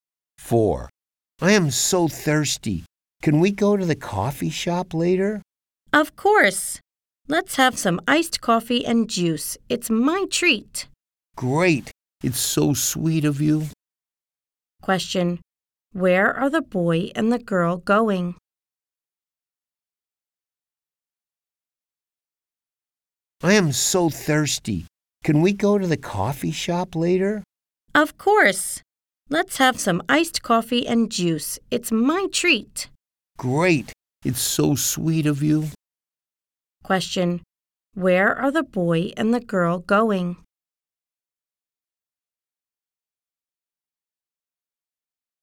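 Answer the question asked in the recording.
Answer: To the coffee shop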